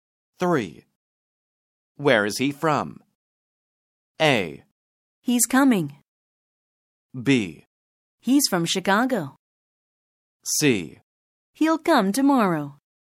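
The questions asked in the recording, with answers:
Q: Where is he from?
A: B: He's from Chicago.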